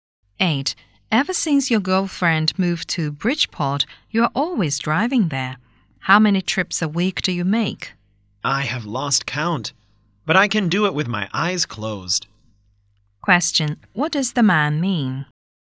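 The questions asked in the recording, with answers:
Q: What does the man mean?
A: He drives there very often and knows the way well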